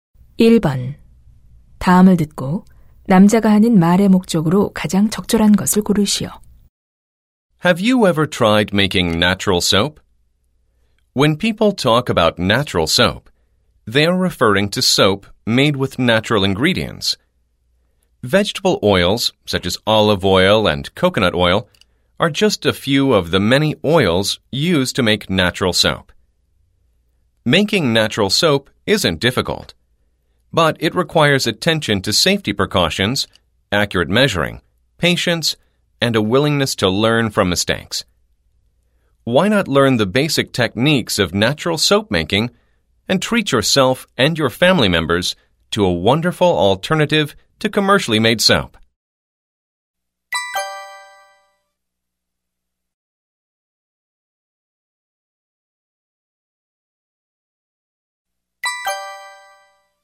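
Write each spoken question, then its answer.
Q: 다음을 듣고 남자가 하는 말의 목적으로 가장 적절한 것을 고르시오.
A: 천연 비누 만들기 배우기를 권장하려고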